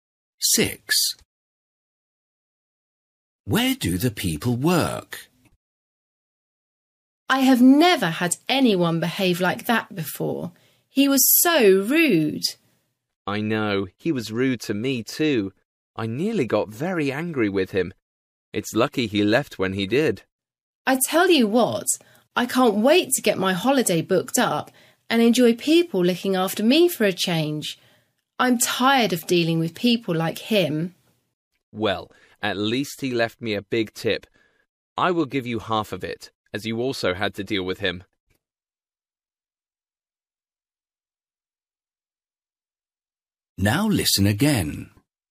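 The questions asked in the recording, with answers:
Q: Where do the people work?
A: In a restaurant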